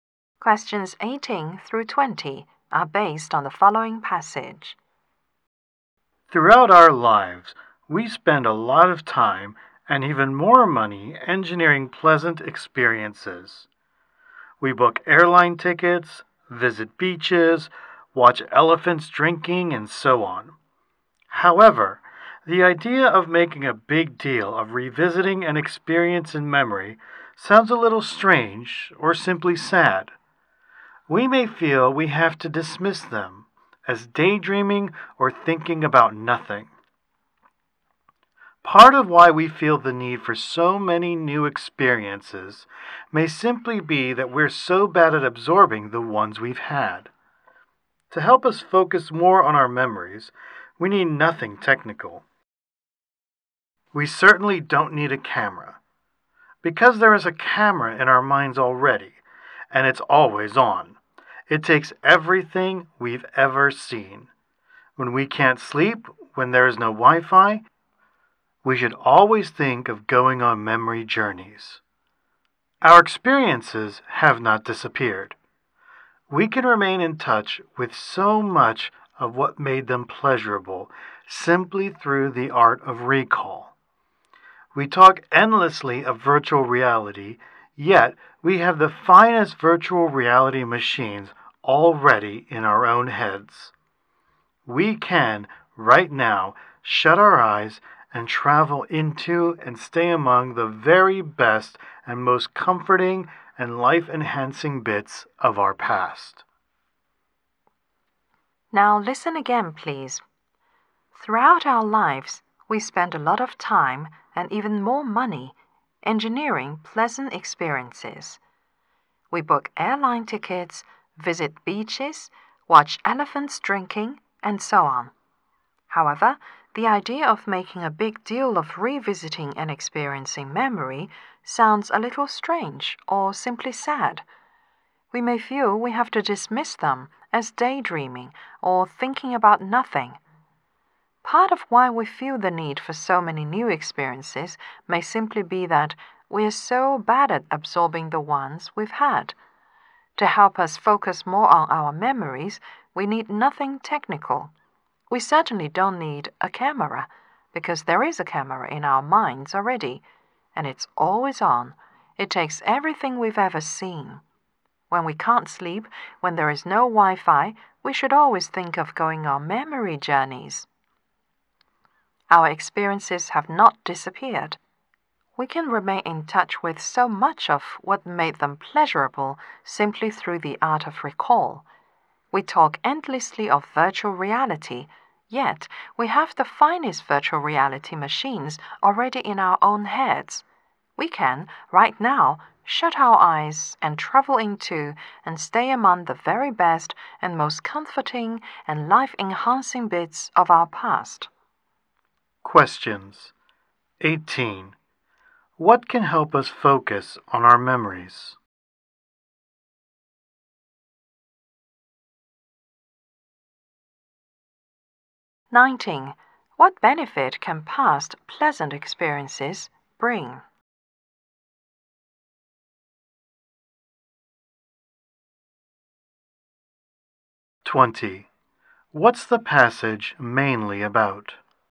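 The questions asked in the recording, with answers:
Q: What can help us focus on our memories?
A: The camera in our minds, meaning the art of recall

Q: What benefit can past pleasant experiences bring?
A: Comfort that enhances our lives when we recall them

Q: What's the passage mainly about?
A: The value of revisiting pleasant memories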